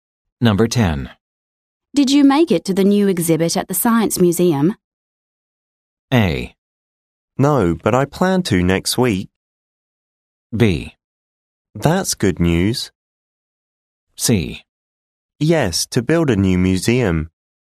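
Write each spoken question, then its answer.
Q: Did you make it to the new exhibit at the Science Museum?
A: A: No, but I plan to next week.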